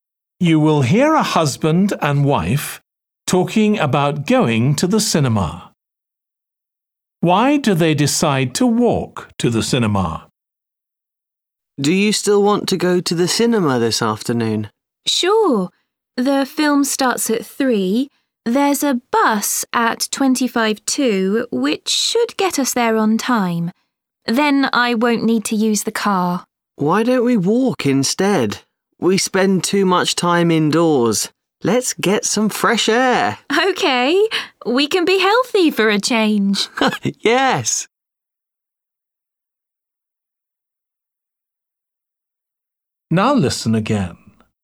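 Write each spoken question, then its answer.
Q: Why do they decide to walk to the cinema?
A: To get fresh air and be healthy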